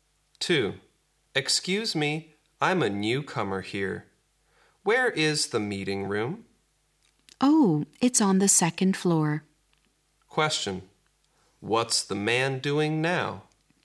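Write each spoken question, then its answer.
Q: What's the man doing now?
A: Asking the way to the meeting room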